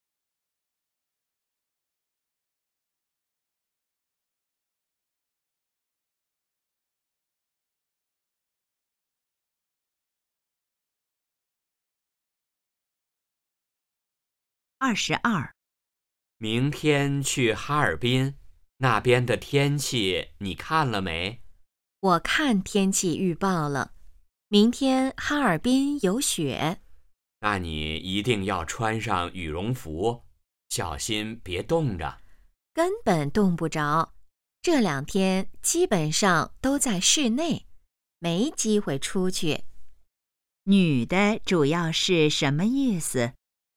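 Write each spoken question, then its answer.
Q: 女的主要是什么意思?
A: 不会冻着,基本在室内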